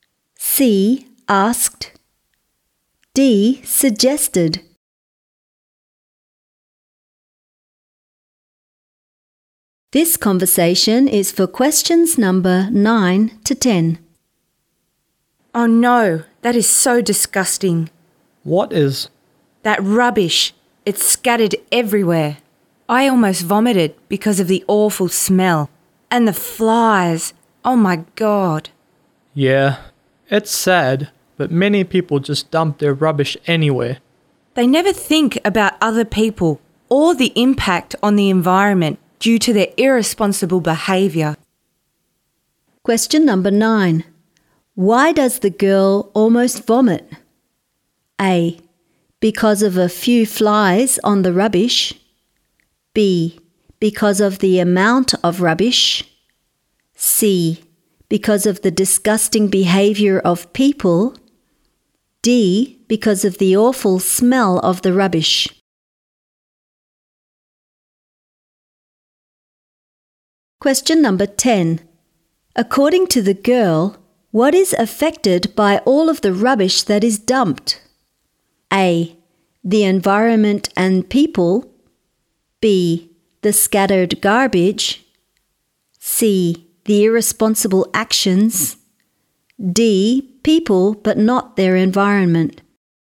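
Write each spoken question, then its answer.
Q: Why does the girl almost vomit?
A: D: Because of the awful smell of the rubbish.

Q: According to the girl, what is affected by all of the rubbish that is dumped?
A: A: The environment and people.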